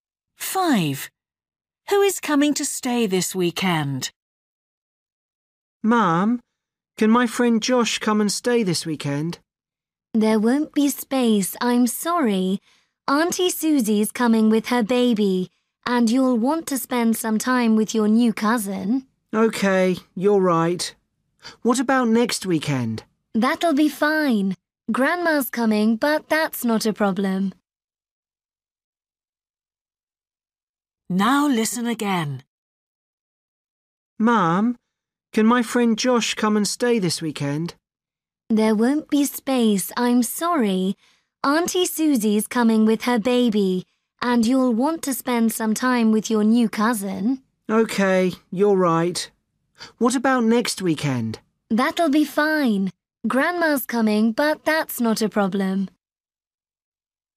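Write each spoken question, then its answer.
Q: Who is coming to stay this weekend?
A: Auntie Susie and her baby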